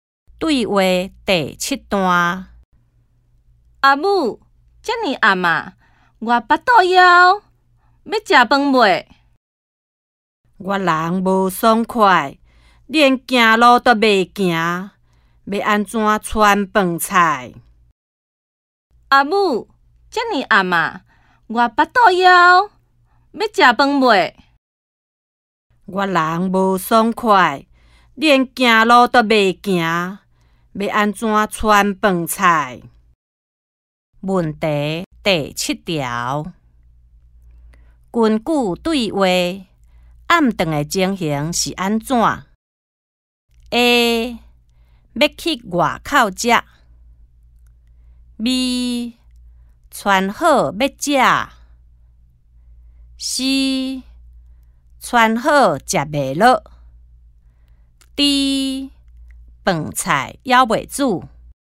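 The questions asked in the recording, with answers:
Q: 根据对话,暗顿的情形是安怎?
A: D: 饭菜还袂煮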